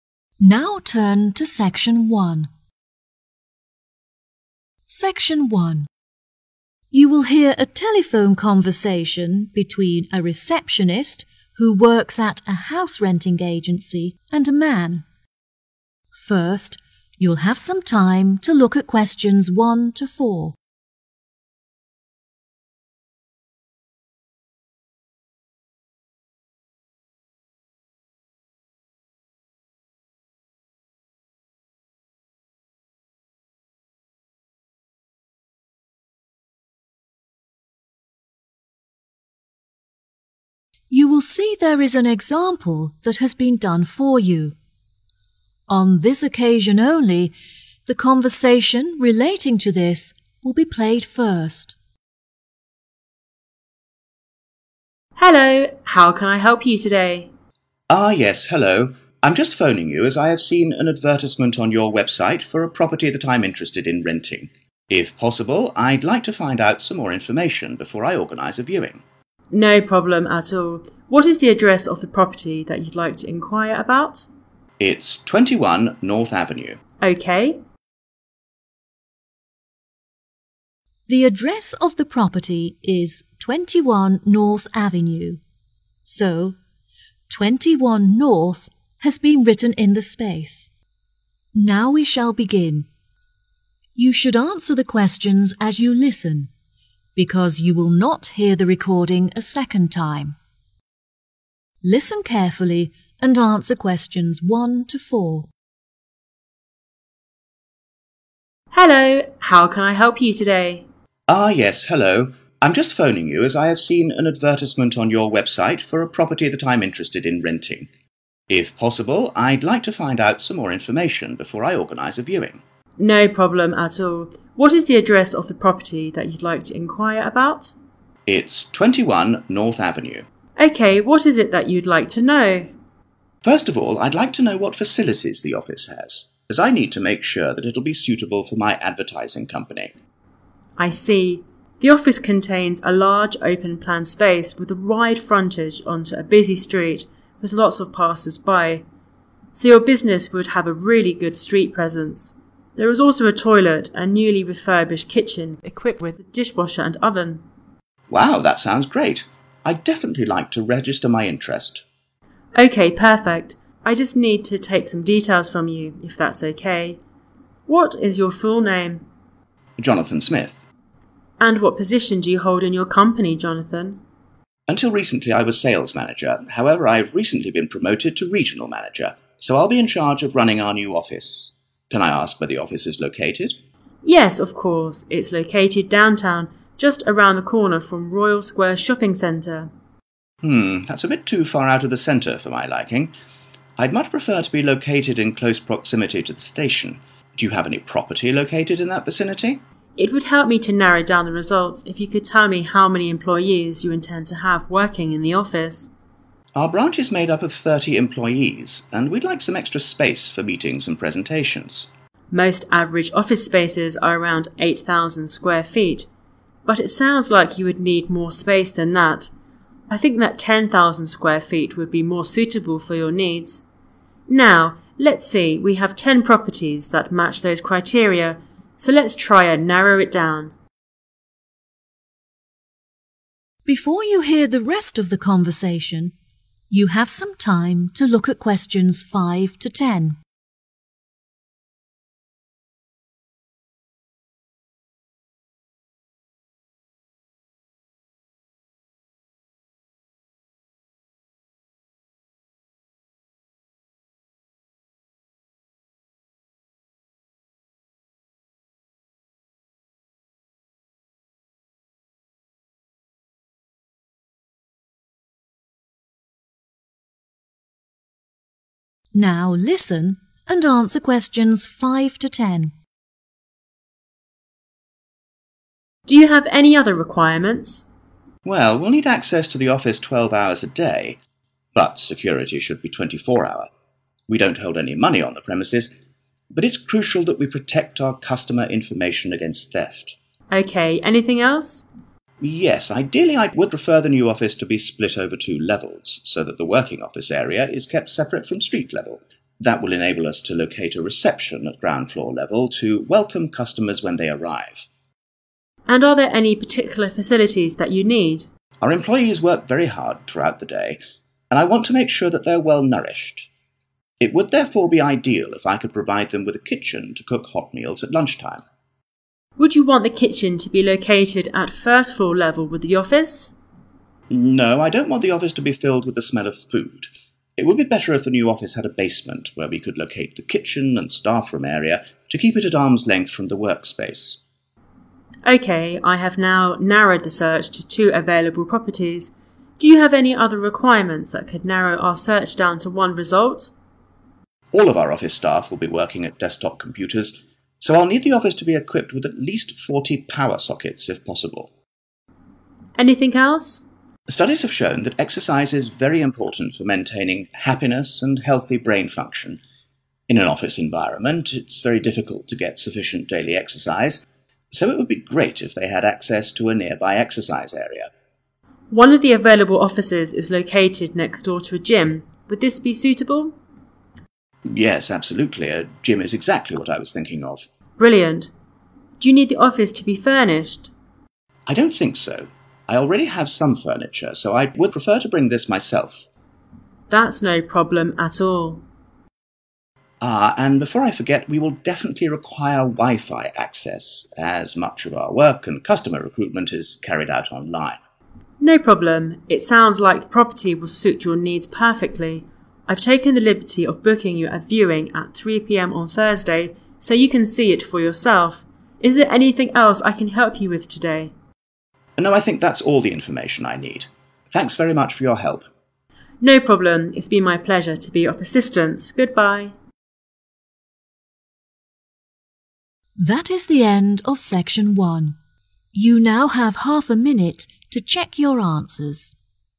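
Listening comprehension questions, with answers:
Complete the notes below. Write NO MORE THAN TWO WORDS A ND/OR A NUMBER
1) – Type of company: 1..............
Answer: advertising

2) – Position: 2..............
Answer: regional manager

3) – Location: near the 3..............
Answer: station

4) – Preferred size of the area: 4.............. ft2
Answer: 10,000

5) – Requirements: 24-hour 5...............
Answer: security

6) 6................ on ground floor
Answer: reception

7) – Preferred facilities: a (an) 7............. to cook in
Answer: kitchen

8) a (an) 8............. away from the workspace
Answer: basement

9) – Daily exercise: a (an) 9..............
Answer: gym

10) – unnecessary: 10................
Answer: furniture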